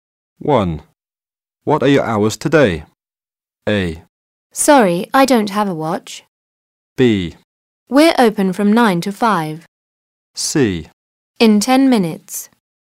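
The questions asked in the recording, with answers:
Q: What are your hours today?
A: B: We're open from 9 to 5.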